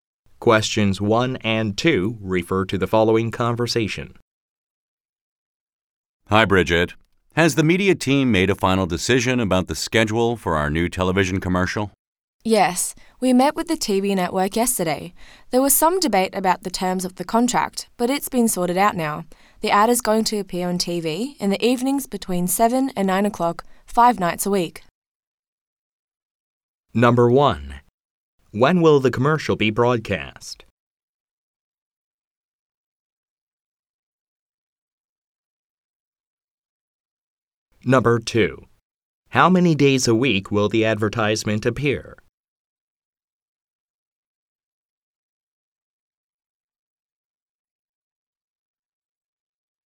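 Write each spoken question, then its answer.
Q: When will the commercial be broadcast?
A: In the evenings between 7 and 9 o'clock

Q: How many days a week will the advertisement appear?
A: 5 days a week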